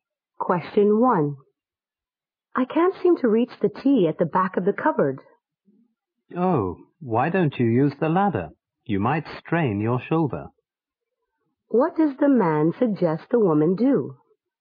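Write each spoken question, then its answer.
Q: What does the man suggest the woman do?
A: Use the ladder.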